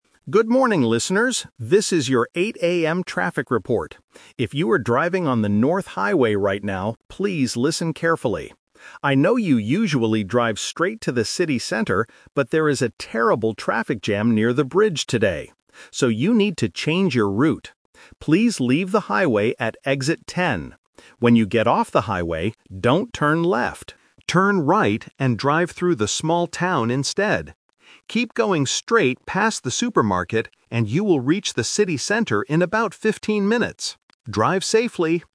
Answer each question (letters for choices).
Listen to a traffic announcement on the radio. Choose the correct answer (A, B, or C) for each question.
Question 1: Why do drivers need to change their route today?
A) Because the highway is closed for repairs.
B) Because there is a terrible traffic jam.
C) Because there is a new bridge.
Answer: B

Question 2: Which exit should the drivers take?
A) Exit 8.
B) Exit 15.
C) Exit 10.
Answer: C

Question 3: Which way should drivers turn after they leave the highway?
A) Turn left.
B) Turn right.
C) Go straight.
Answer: B

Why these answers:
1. The Key: The announcer explains the twist clearly: "...but there is a terrible traffic jam near the bridge today." The Trap: Option (A) is a very common reason for traffic changes in listening tests, but it is not mentioned here. Option (C) mentions "bridge", which is a keyword in the audio, but the bridge is not new; it's just the location of the traffic jam.
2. The Key: The announcer gives a direct instruction: "Please leave the highway at Exit 10." The Trap: Option (A) uses the number "8", which is the time of the radio report (8 AM). Option (B) uses the number "15", which is the number of minutes it will take to reach the city center later.
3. The Key: The instruction is: "Turn right and drive through the small town instead." The Trap: Option (A) is the classic trap. The announcer says "left" but in a negative sentence ("don't turn left"). Option (C) is what drivers usually do on the highway before the plan was changed.

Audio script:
If you are driving on the North Highway right now, please listen carefully. I know you usually drive straight to the city center, but there is a terrible traffic jam near the bridge today. So, you need to change your route. Please leave the highway at Exit 10. When you get off the highway, don't turn left. Turn right and drive through the small town instead. Keep going straight past the supermarket, and you will reach the city center in about fifteen minutes. Drive safely!